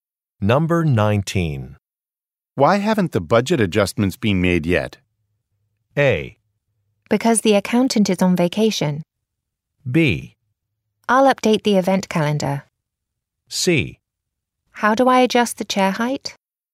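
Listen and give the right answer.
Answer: A: Because the accountant is on vacation.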